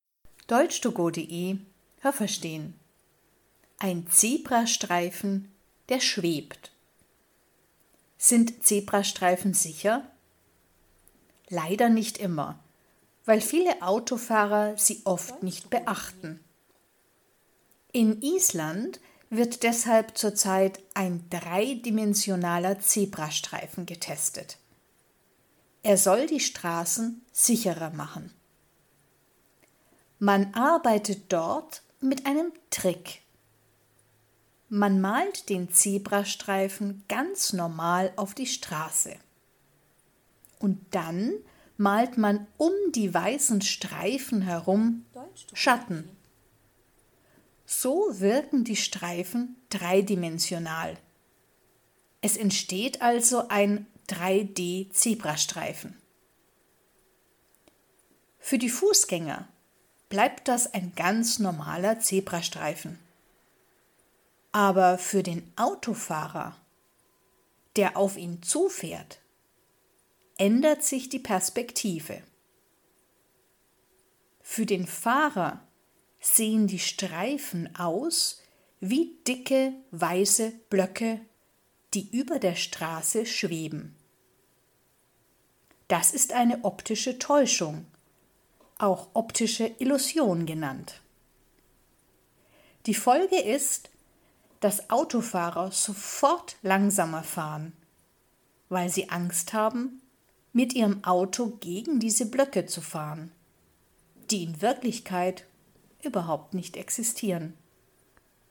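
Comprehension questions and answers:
Was haben Sie gehört? Es gibt nur eine korrekte Antwort.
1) In _____ wird ein dreidimensionaler Zebrastreifen getestet.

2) Der Zebrastreifen wirkt dreidimensional, weil ...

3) Für den Fußgänger bleibt der Zebrastreifen ...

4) Der Autofahrer sieht die Streifen im Zebrastreifen ...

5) Das ist eine _____ Illusion.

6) Der Autofahrer sieht die Blöcke und fährt ...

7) Die Blöcke, die der Autofahrer sieht, ...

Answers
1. Island
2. man um die weißen Streifen herum Schatten malt
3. ein ganz normaler Zebrastreifen
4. als dicke weiße Blöcke, die über der Straße schweben
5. optische
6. sofort langsamer
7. existieren in Wirklichkeit überhaupt nicht

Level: A (einfach)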